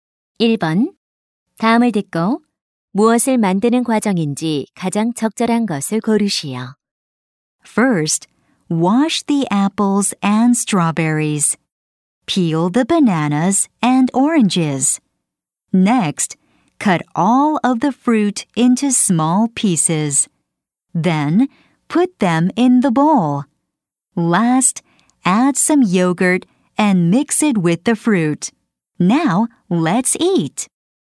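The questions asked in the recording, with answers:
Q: 다음을 듣고 무엇을 만드는 과정인지 가장 적절한 것을 고르시오.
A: 과일 샐러드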